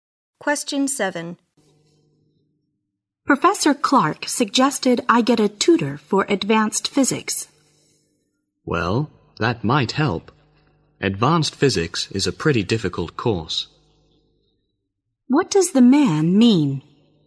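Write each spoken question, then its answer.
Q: What does the man mean?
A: Getting a tutor may help because the course is difficult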